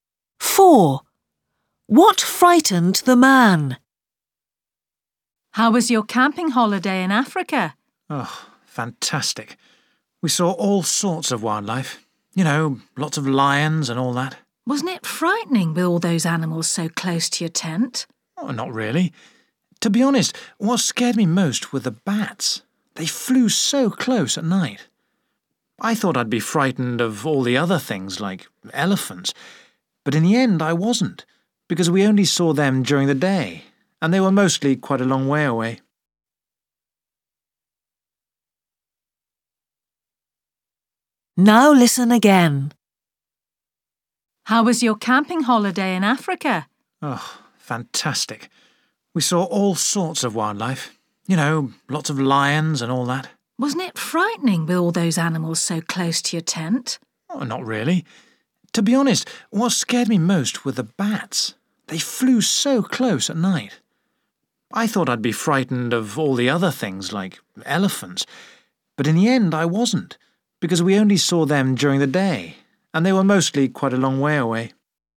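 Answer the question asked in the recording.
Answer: The bats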